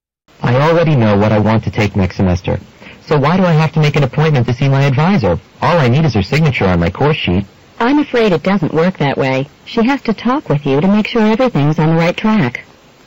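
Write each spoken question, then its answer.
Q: What does the woman mean?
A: The man must meet with his advisor in person; a signature alone isn't enough.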